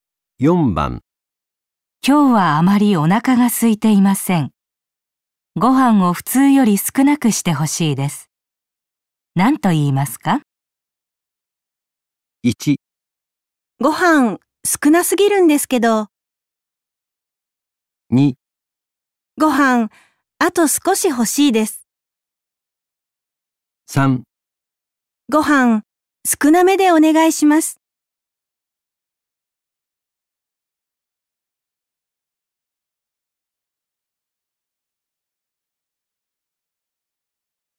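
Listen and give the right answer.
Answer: 3: ご飯少なめでお願いします。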